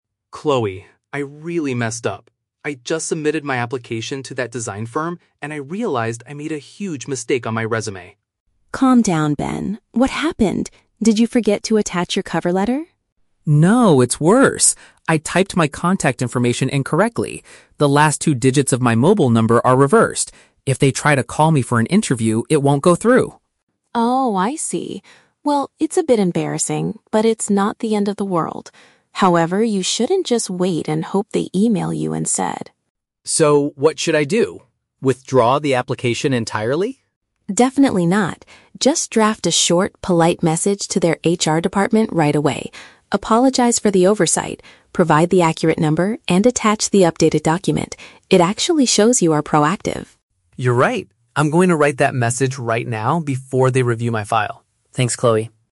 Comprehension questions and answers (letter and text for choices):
Listen to the conversation between two friends and choose the correct answer (A, B, or C) for each question.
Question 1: What mistake did the man make on his application?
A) He provided an inaccurate way for the employer to call him.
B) He forgot to upload his cover letter to the company's system.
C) He sent his documents to the wrong design firm by accident.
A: A) He provided an inaccurate way for the employer to call him.

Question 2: What does the woman tell the man NOT to do?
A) Send a direct message to the human resources team.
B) Remove his current application from the hiring process.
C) Update his resume with a completely different phone number.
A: B) Remove his current application from the hiring process.

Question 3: What is the woman's opinion about sending a correction email?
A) It is too embarrassing and might ruin his chances completely.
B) It should only be done after the company reviews his file.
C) It will demonstrate that he takes quick and responsible action.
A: C) It will demonstrate that he takes quick and responsible action.

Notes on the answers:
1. Ben states that he "typed my contact information incorrectly" and the "digits of my mobile number are reversed". Option (A) correctly paraphrases this situation. Option (B) is The Trap: Chloe asks, "Did you forget to attach your cover letter?", but Ben immediately replies, "No". Option (C) is not mentioned in the audio.
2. Ben asks, "Withdraw the application entirely?" and Chloe responds, "Definitely not." Option (B) paraphrases the act of withdrawing as "Remove his current application". Option (A) is The Trap: Chloe actually encourages him to send a message to HR ("Just draft a short, polite message to their HR department"), so this is not something she tells him NOT to do. Option (C) is not mentioned.
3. Chloe advises him to send the message because "It actually shows you are proactive." Option (C) perfectly paraphrases the word "proactive" as taking "quick and responsible action". Option (A) is The Trap: Chloe admits the mistake is "a bit embarrassing," but she emphasizes that "it's not the end of the world," meaning it won't ruin his chances. Option (B) is The Trap: Ben says he will send it "before they review my file", not after.

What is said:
Ben: Chloe, I really messed up! I just submitted my application to that design firm, and I realized I made a huge mistake on my resume.
Chloe: Calm down, Ben. What happened? Did you forget to attach your cover letter?
Ben: No, it's worse! I typed my contact information incorrectly. The last two digits of my mobile number are reversed. If they try to call me for an interview, it won't go through!
Chloe: Oh, I see. Well, it's a bit embarrassing, but it's not the end of the world. However, you shouldn't just wait and hope they email you instead.
Ben: So what should I do? Withdraw the application entirely?
Chloe: Definitely not. Just draft a short, polite message to their HR department right away. Apologize for the oversight, provide the accurate number, and attach the updated document. It actually shows you are proactive.
Ben: You're right. I'm going to write that message right now before they review my file. Thanks, Chloe.